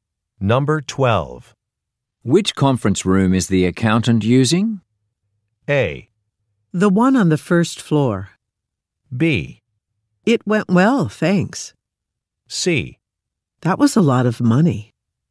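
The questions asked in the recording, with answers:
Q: Which conference room is the accountant using?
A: A: The one on the first floor.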